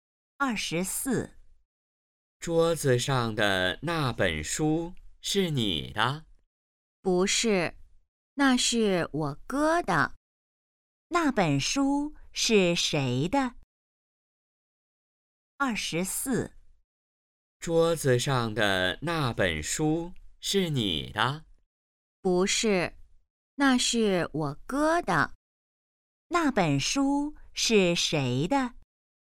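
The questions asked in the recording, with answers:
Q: 那本书是谁的?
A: 她哥哥的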